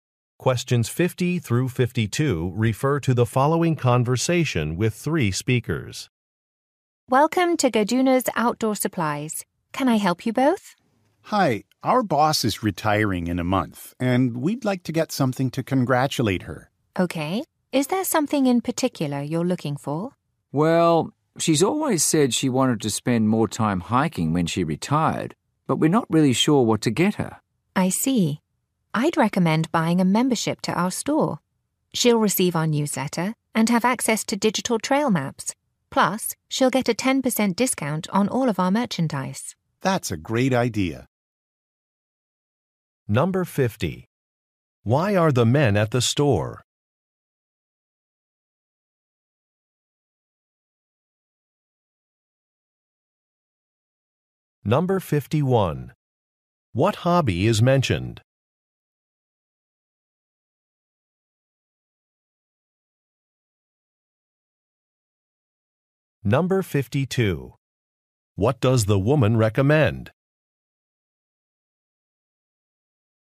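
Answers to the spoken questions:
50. To buy a retirement gift for their boss
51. Hiking
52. A store membership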